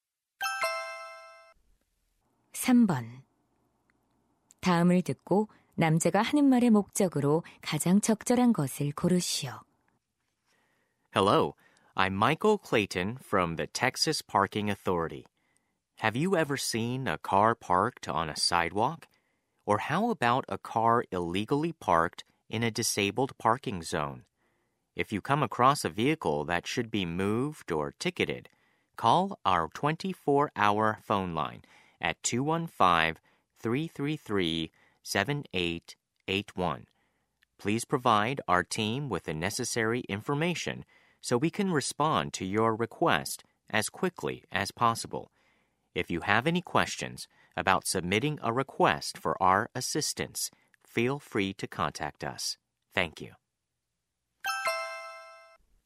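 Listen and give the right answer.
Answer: 불법 주차 차량 신고 전화를 안내하려고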